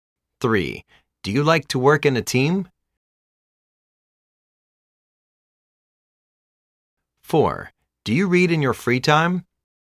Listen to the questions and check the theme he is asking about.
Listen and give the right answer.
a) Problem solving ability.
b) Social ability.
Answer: b) Social ability.